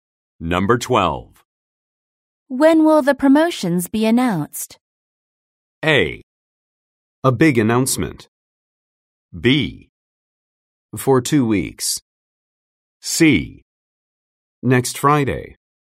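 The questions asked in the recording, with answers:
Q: When will the promotions be announced?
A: C: Next Friday.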